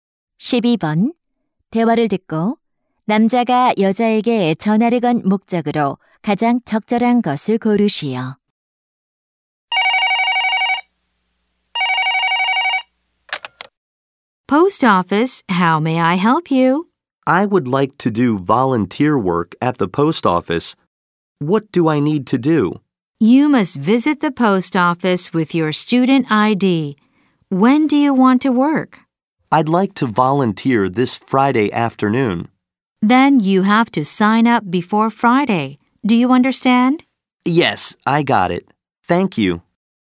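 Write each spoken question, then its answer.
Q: 대화를 듣고 남자가 여자에게 전화를 건 목적으로 가장 적절한 것을 고르시오.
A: 우체국 자원봉사 방법을 문의하려고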